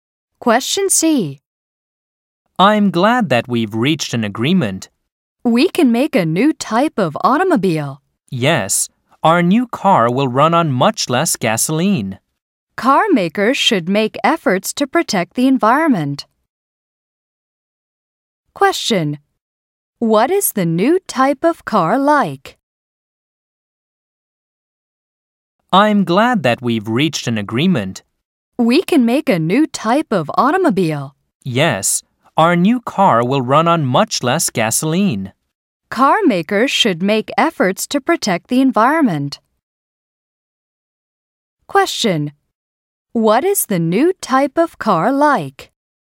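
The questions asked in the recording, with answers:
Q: What is the new type of car like?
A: It will run on much less gasoline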